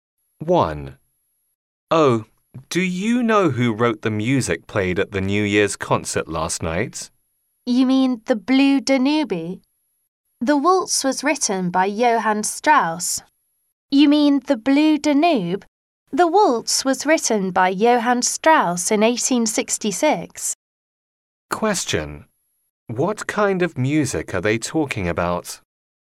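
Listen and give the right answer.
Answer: A waltz (the Blue Danube)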